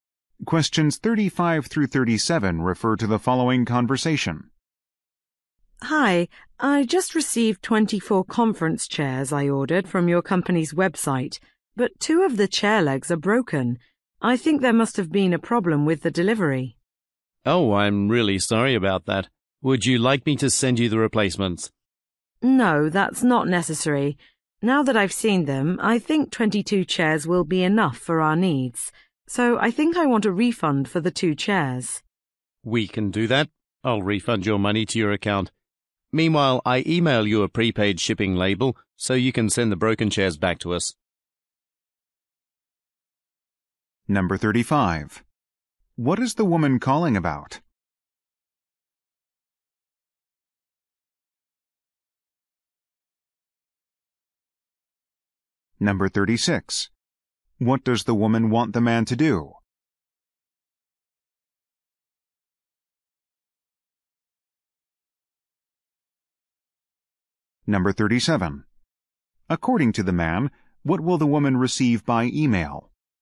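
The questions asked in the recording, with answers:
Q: What is the woman calling about?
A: Two chairs arrived with broken legs

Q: What does the woman want the man to do?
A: Refund her for the two chairs

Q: According to the man, what will the woman receive by email?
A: A prepaid shipping label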